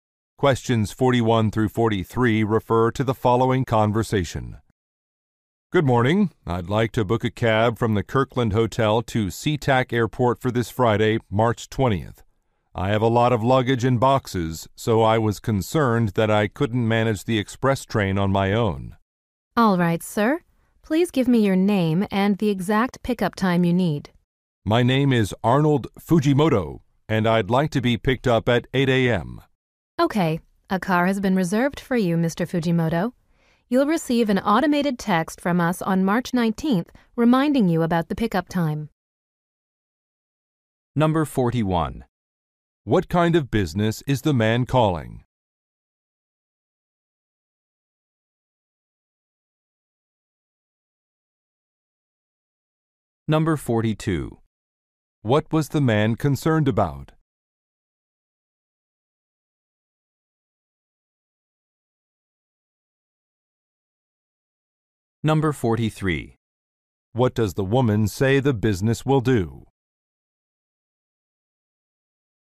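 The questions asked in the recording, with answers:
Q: What kind of business is the man calling?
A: A taxi service

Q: What was the man concerned about?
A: Managing his luggage and boxes on the express train

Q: What does the woman say the business will do?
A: Send him a text reminder about the pickup time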